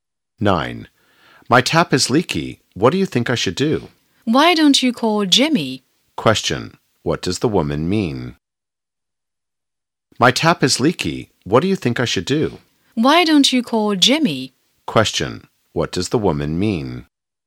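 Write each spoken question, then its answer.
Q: What does the woman mean?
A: The man should call Jimmy to fix the tap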